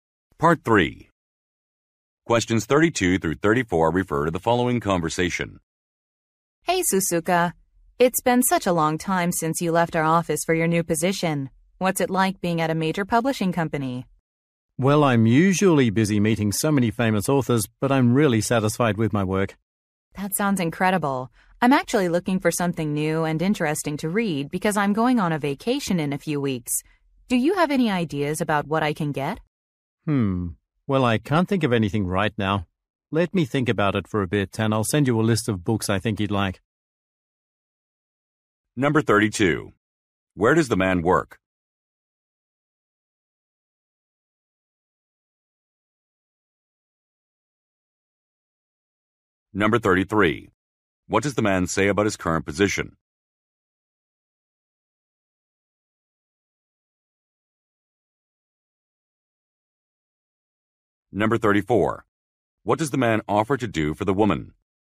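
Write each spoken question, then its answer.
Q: What does the man say about his current position?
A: He is busy but really satisfied with his work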